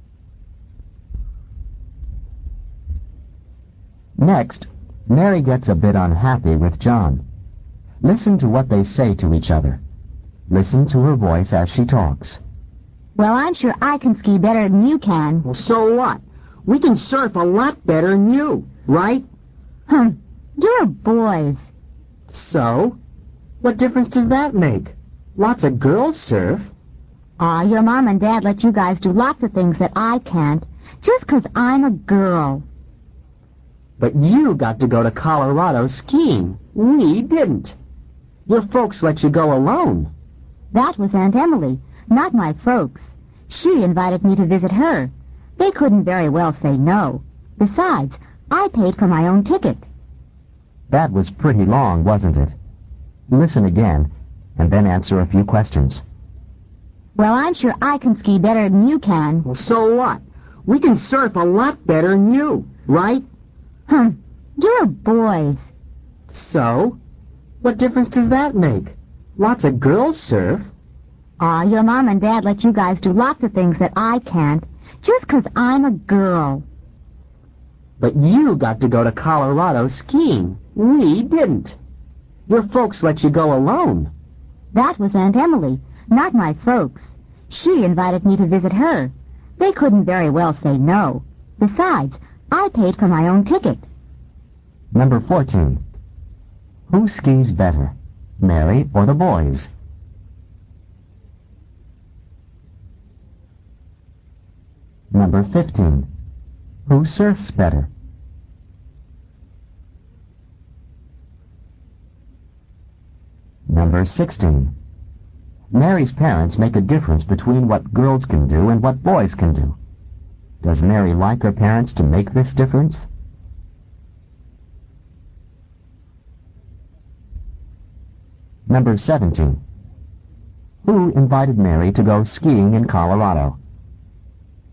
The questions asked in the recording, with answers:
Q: Who skis better, Mary or the boys?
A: Mary does.

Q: Who surfs better?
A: the boys do.

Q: Does Mary like her parents to make this difference?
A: the answer is B, no she doesn't.

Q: Who invited Mary to go skiing in Colorado?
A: Mary's aunt, capital A-U-N-T, Emily, capital E-M-I-L-Y.